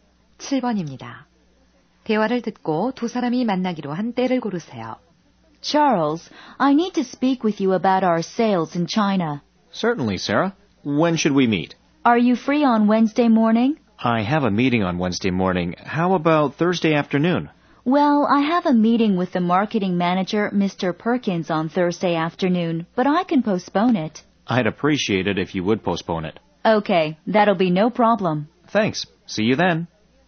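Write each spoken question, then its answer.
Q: 대화를 듣고 두 사람이 만나기로 한 때를 고르세요.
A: 목요일 오후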